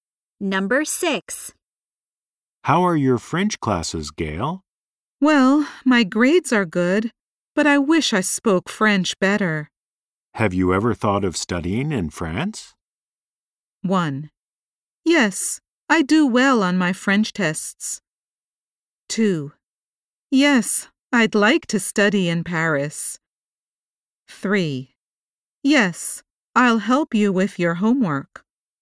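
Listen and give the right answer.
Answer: 2: Yes, I'd like to study in Paris.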